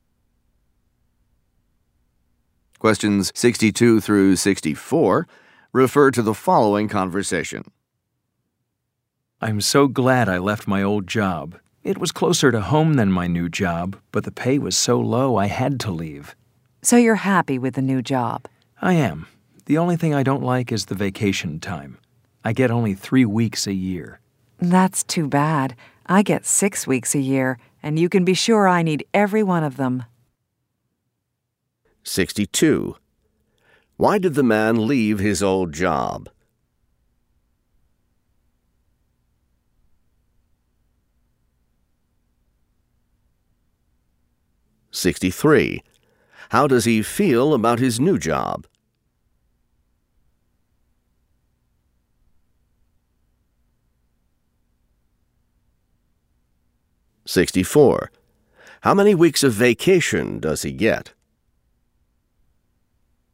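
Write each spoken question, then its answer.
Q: Why did the man leave his old job?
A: The pay was too low

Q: How does he feel about his new job?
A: Happy

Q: How many weeks of vacation does he get?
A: 3 weeks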